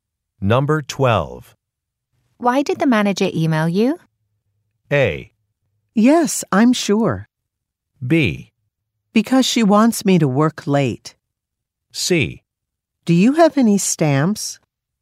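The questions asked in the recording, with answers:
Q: Why did the manager email you?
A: B: Because she wants me to work late.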